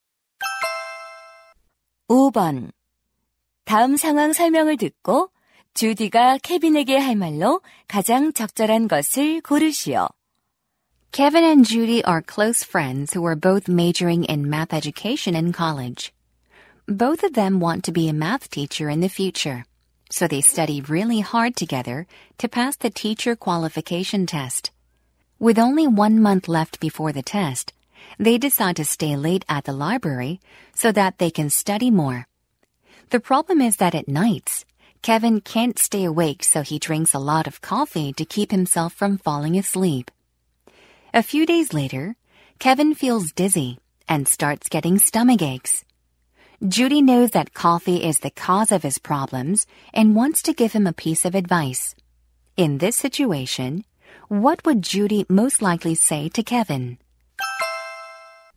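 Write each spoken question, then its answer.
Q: In this situation, what would Judy most likely say to Kevin?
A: You should cut down on coffee.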